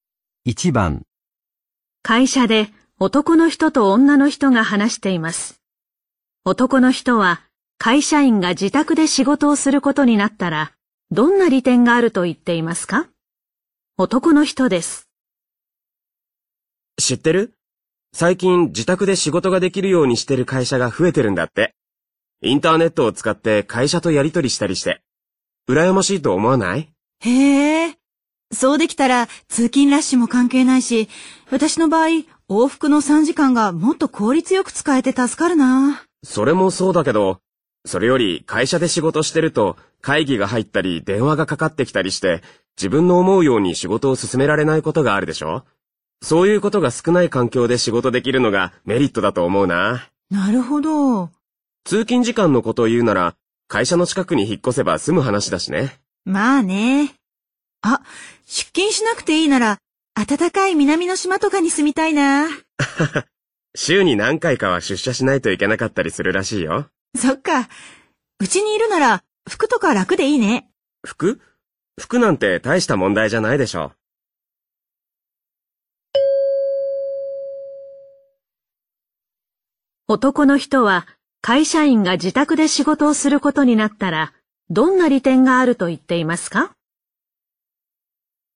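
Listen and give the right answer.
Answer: 会議や電話に邪魔されず、自分の思うように仕事を進められること

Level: N1级别听力题库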